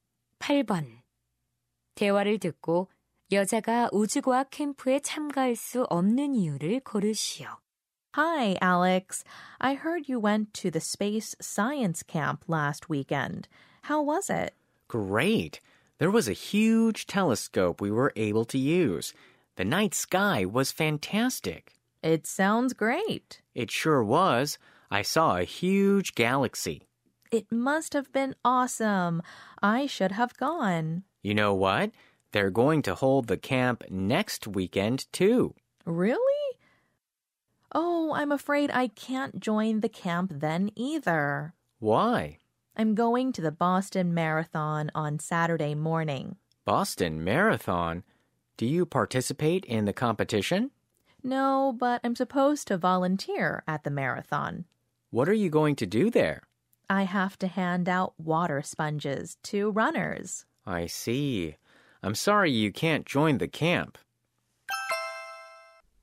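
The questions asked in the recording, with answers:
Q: 대화를 듣고 여자가 우주과학 캠프에 참가할 수 없는 이유를 고르시오.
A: 보스턴 마라톤에서 자원봉사를 해야 해서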